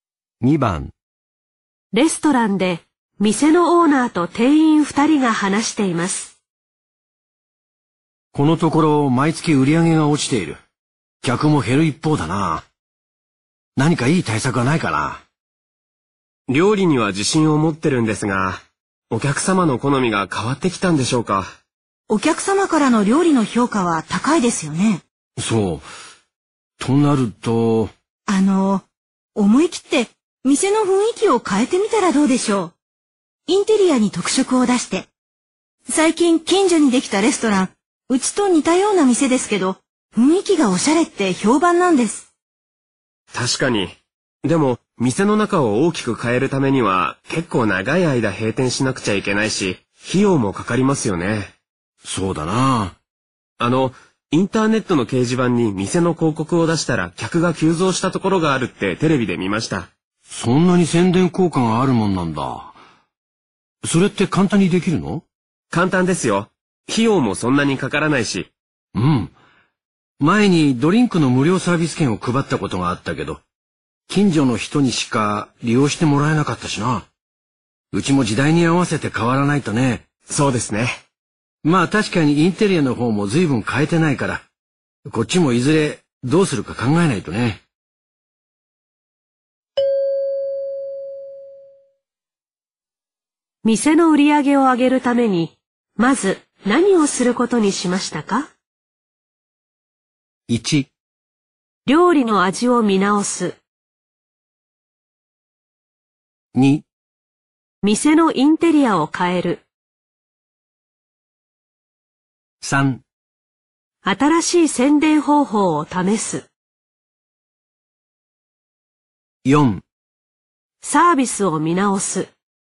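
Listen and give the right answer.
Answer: 3: 新しい宣伝方法を試す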